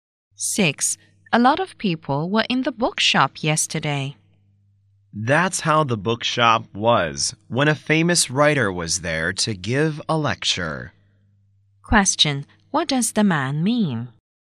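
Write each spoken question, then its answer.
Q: What does the man mean?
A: A famous writer was giving a lecture there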